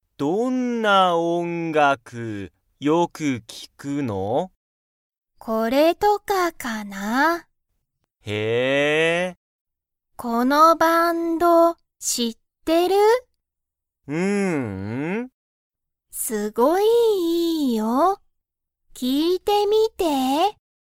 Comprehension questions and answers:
トモヤは、そのバンドを知(し)っていますか?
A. はい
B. いいえ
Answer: いいえ

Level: Level 1

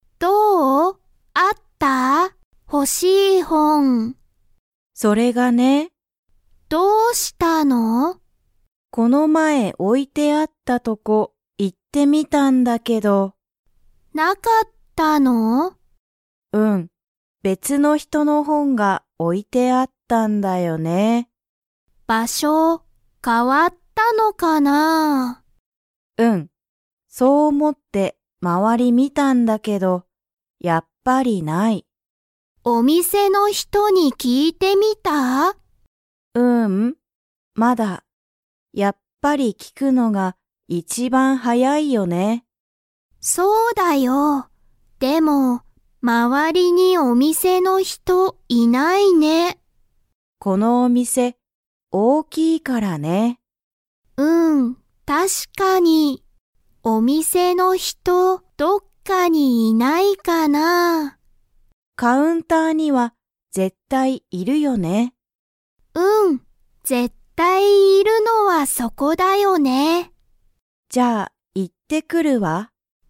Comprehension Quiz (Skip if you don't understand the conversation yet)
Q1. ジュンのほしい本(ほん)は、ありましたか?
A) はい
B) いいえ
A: いいえ

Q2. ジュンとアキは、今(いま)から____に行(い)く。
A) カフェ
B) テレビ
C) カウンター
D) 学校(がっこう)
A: カウンター

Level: Level 2

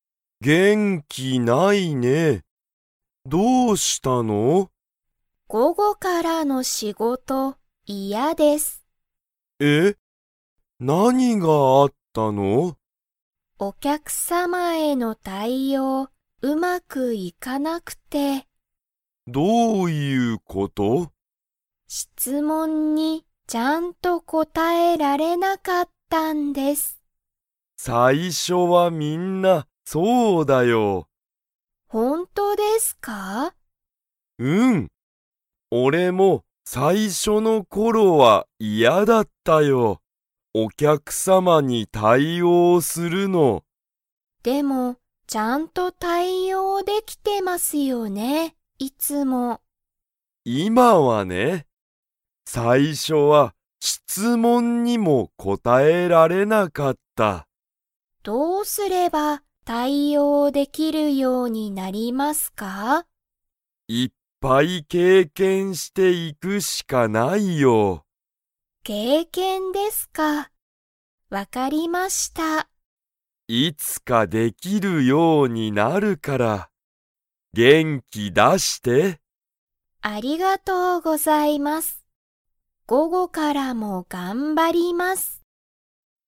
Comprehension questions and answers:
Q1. 田中たなかさんは、お客様きゃくさまからの に答こたえられなかった。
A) 午後ごご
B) お酒さけ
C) 経験けいけん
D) 質問しつもん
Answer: 質問しつもん

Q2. 田中たなかさんは、午後ごごからも頑張がんばりますか?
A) はい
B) いいえ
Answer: はい

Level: Level 3

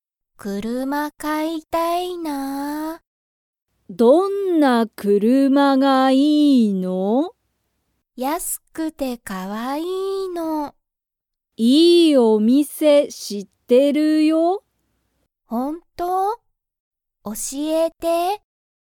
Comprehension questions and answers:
みかは、いい____を知(し)っている。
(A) お金(かね)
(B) お店(みせ)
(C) 車(くるま)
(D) スマホ))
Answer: お店(みせ)

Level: Level 1

